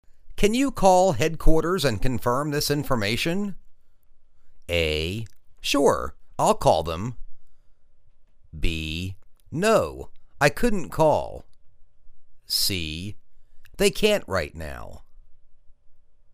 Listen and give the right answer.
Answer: Sure. I'll call them.